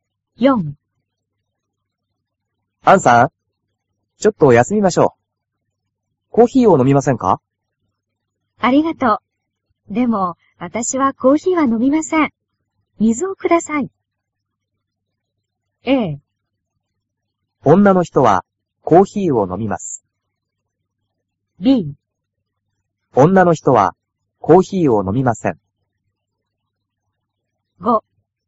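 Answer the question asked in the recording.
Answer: B: 女の人はコーヒーを飲みません。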